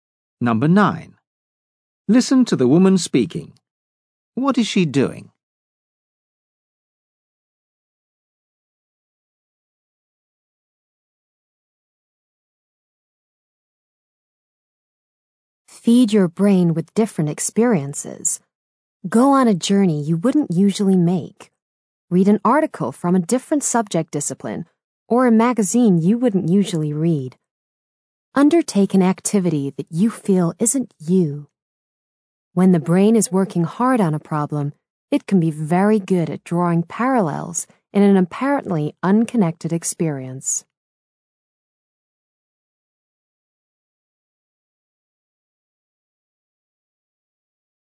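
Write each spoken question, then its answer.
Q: What is she doing?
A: Giving advice on how to stimulate creative thinking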